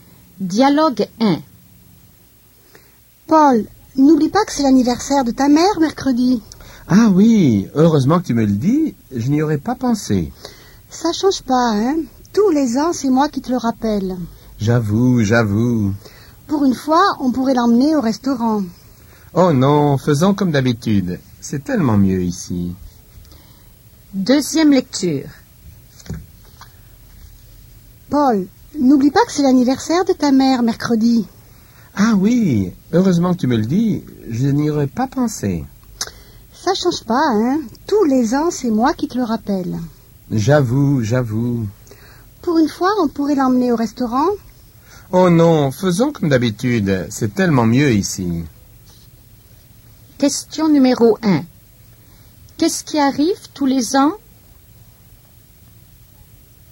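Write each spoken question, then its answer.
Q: Qu'est-ce qui arrive tous les ans?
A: Paul oublie l'anniversaire de sa mère et c'est sa femme qui le lui rappelle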